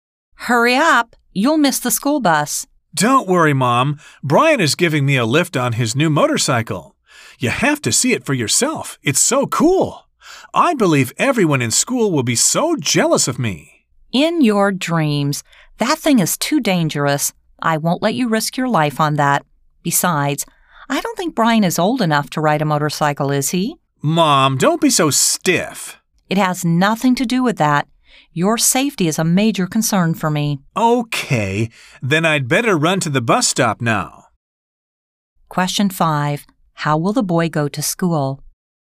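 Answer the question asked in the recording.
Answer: By school bus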